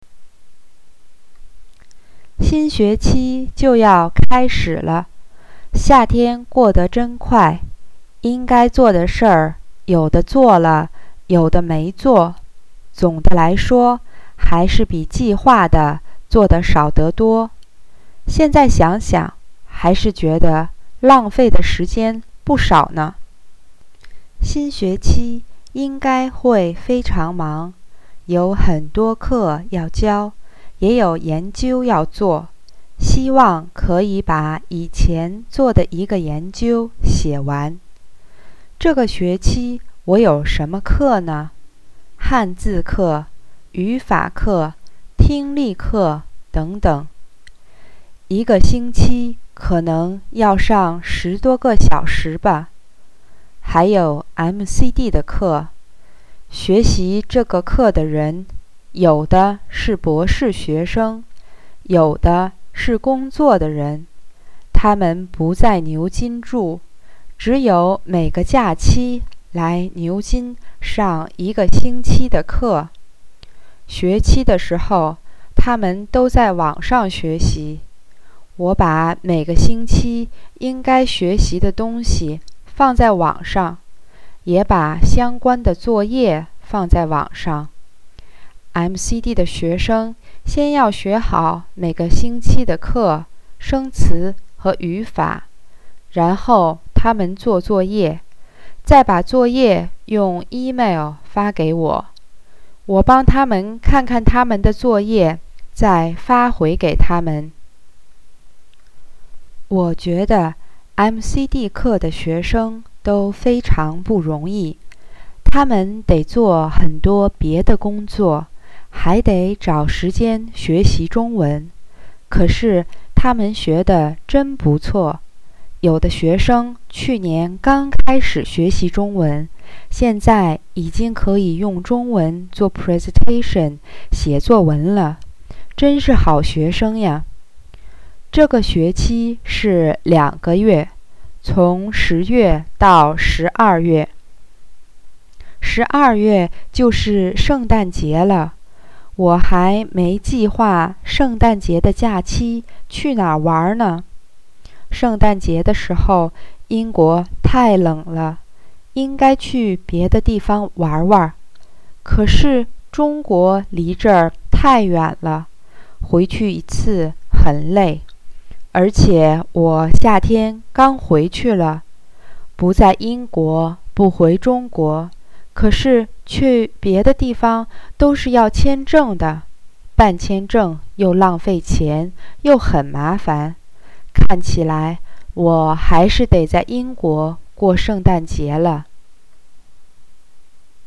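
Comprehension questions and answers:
Please listen and answer the questions below in Chinese:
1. How do I think of my summer?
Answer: 夏天过得真快,做的事比计划的少得多,浪费了不少时间。

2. Why do I think that I will be very busy during the new term?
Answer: 有很多课要教,也有研究要做。

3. How does the MCD course run according to the text?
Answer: 学生每个假期来牛津上一个星期的课,学期时在网上学习,用email交作业,老师看后发回。

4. How do I think of the MCD students?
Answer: 他们非常不容易,要工作还得找时间学中文,可是学得真不错。

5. What is my plan for the Christmas holiday?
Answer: 还没计划,看起来得在英国过圣诞节。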